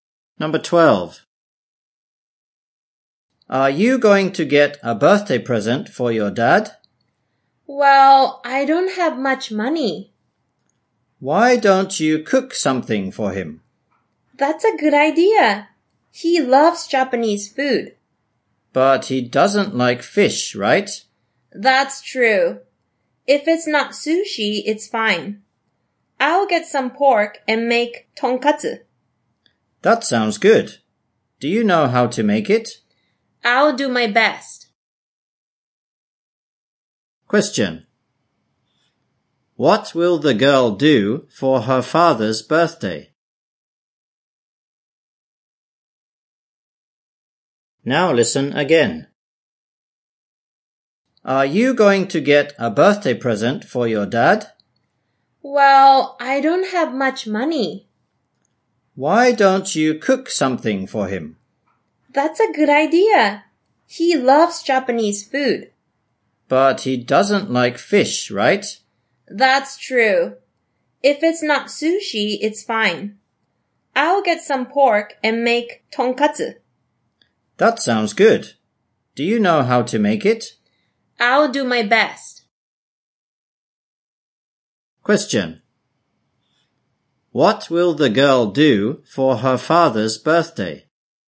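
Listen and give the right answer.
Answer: Make tonkatsu for him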